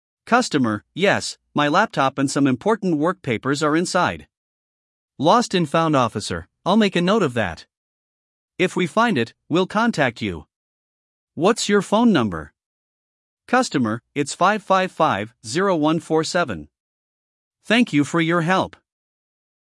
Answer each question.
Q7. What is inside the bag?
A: Laptop and papers

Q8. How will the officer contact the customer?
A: By phone

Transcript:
Customer: Yes, my laptop and some important work papers are inside.
Lost and Found Officer: I'll make a note of that. If we find it, we'll contact you. What's your phone number?
Customer: It's 555-0147. Thank you for your help!